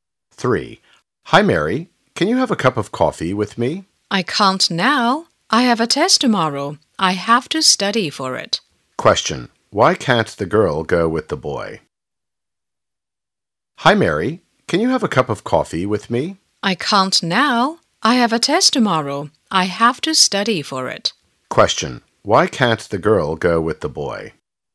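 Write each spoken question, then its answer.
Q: Why can't the girl go with the boy?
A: She has to study for a test tomorrow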